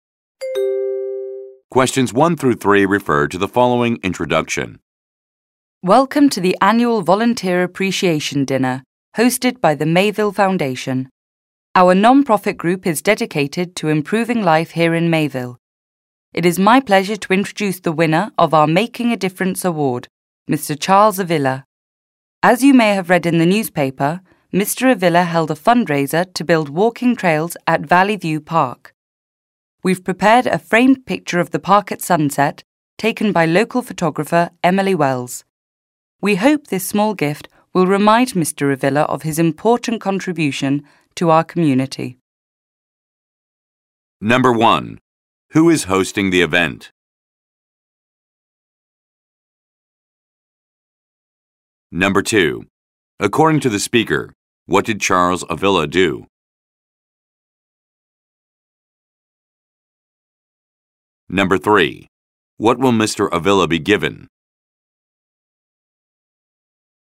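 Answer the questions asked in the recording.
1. The Mayville Foundation, a non-profit group
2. He held a fundraiser to build walking trails at Valley View Park
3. A framed picture of the park at sunset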